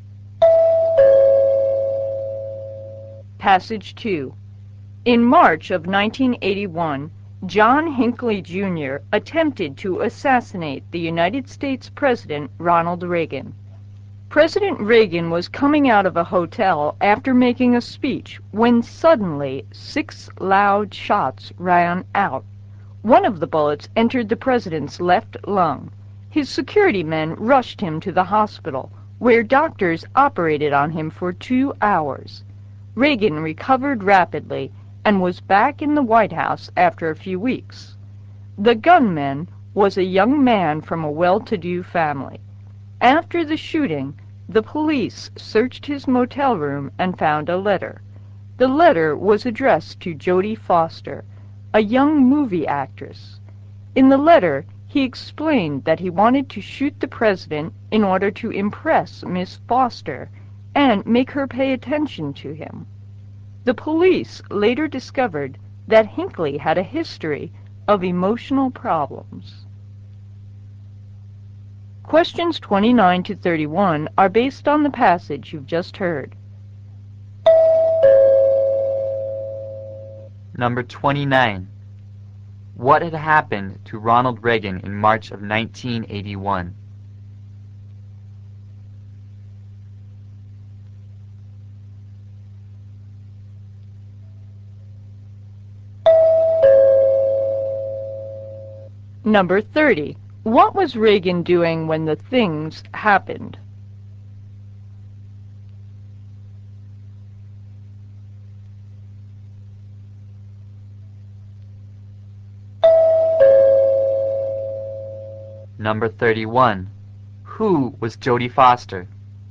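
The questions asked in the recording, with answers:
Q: What had happened to Ronald Reagan in March of 1981?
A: He was shot in an assassination attempt.

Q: What was Reagan doing when the things happened?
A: Coming out of a hotel after making a speech.

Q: Who was Jodie Foster?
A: A young movie actress.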